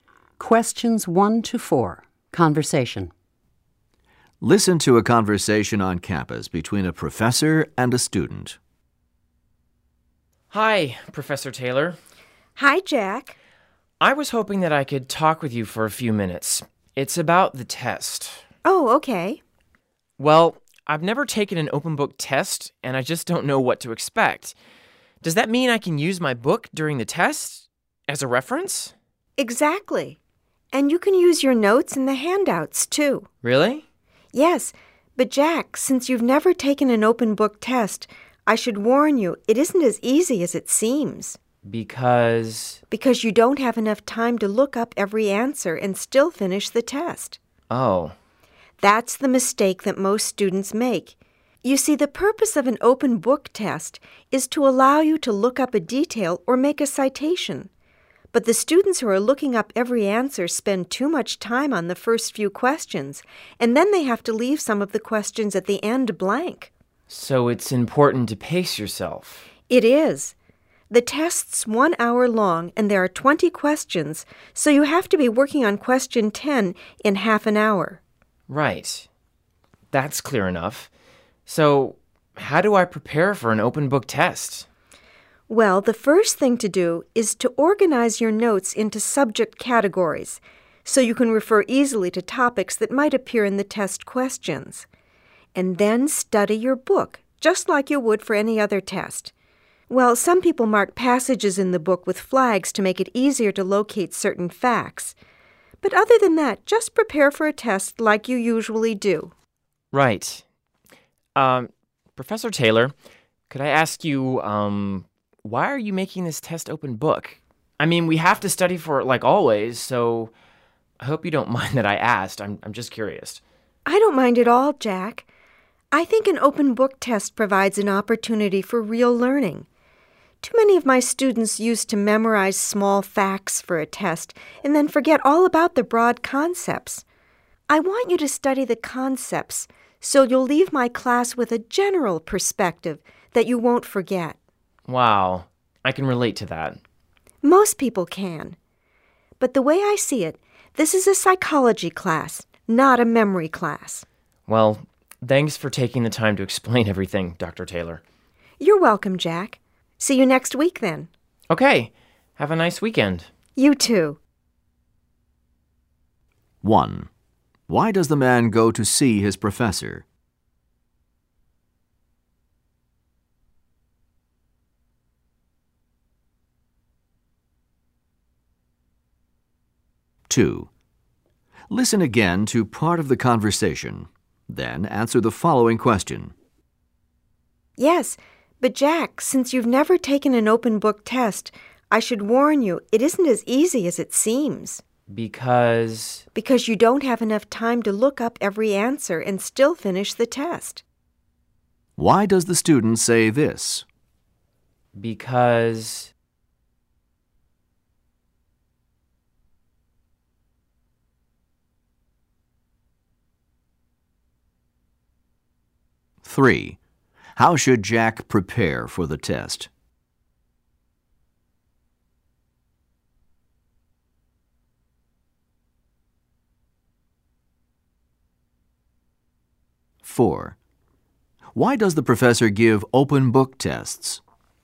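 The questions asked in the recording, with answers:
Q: Why does the man go to see his professor?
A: To ask about the open book test and what to expect

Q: How should Jack prepare for the test?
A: Organize his notes by subject and study the book as for any other test

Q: Why does the professor give open book tests?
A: So students learn broad concepts instead of memorizing small facts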